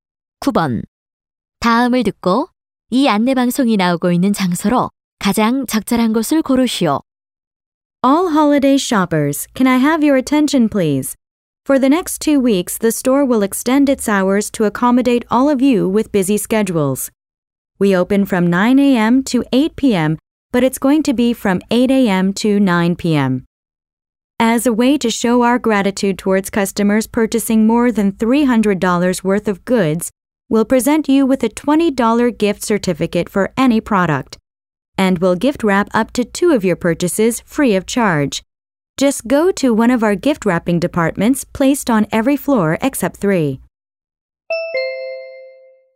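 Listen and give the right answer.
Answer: 백화점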